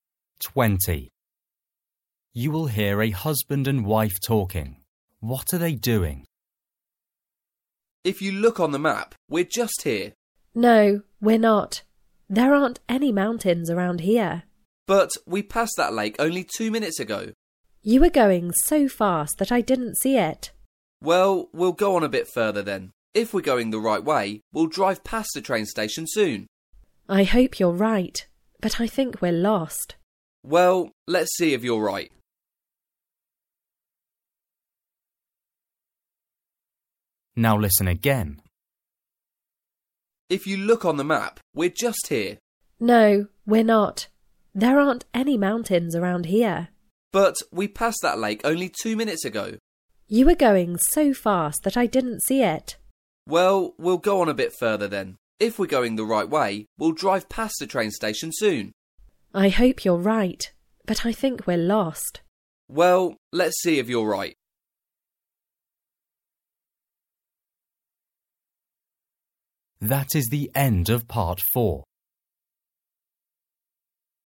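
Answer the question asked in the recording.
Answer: Driving and trying to find their way with a map (they may be lost)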